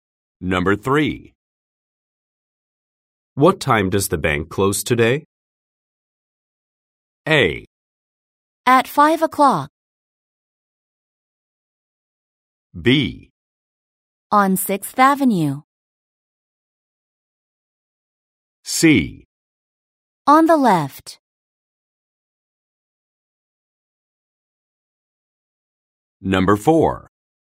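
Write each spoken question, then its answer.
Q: What time does the bank close today?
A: A: At 5 o'clock.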